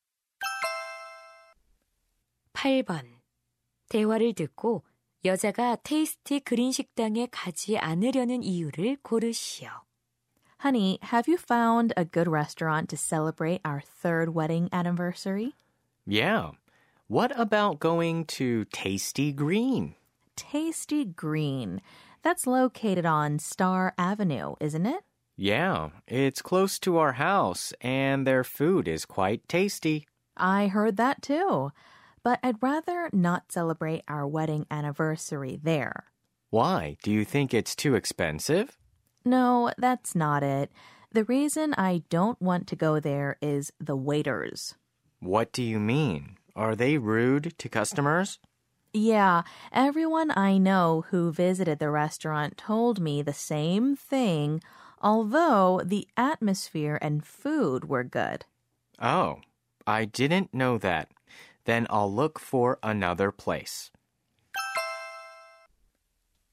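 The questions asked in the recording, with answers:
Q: 대화를 듣고 여자가 테이스티 그린 식당에 가지 않으려는 이유를 고르시오.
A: 종업원들이 손님에게 무례해서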